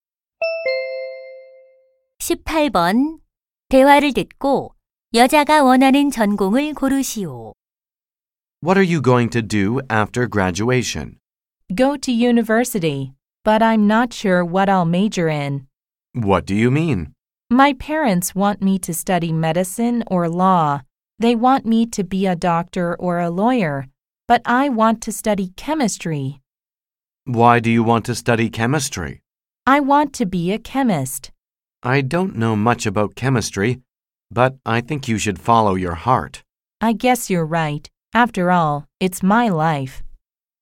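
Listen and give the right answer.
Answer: 화학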